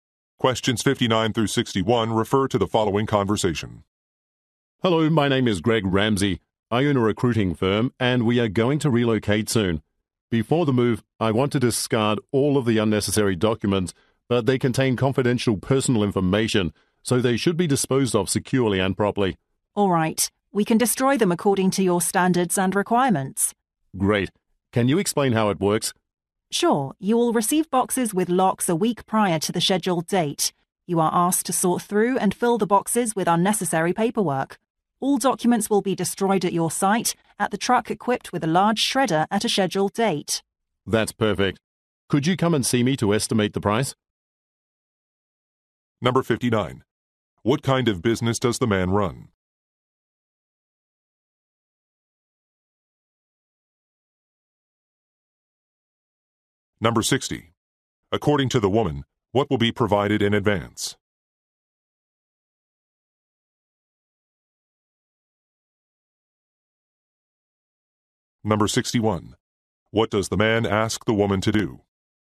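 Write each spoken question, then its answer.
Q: What kind of business does the man run?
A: A recruiting firm

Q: According to the woman, what will be provided in advance?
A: Boxes with locks

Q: What does the man ask the woman to do?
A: Come and give a price estimate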